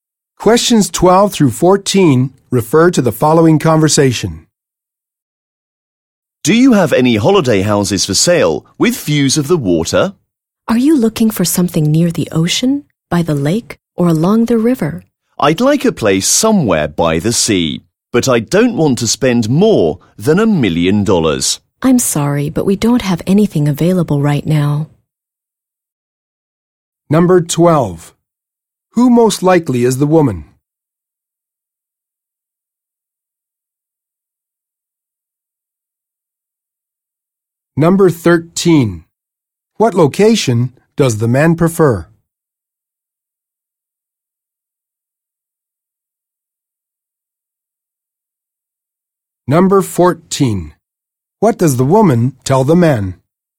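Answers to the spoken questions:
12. A real estate agent
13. By the sea
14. Nothing suitable is available right now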